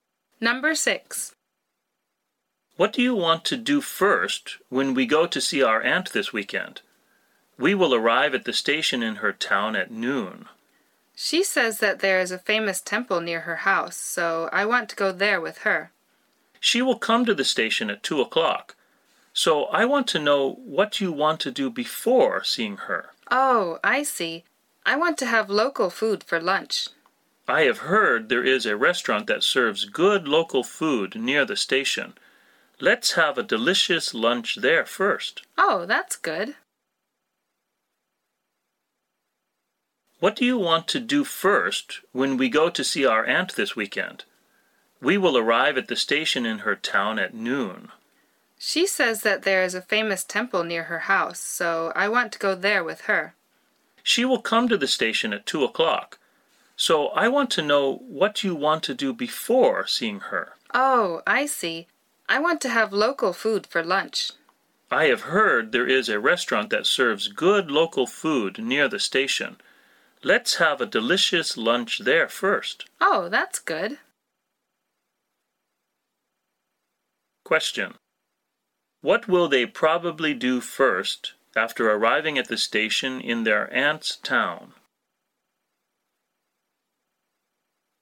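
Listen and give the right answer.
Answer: Have local food for lunch at a restaurant near the station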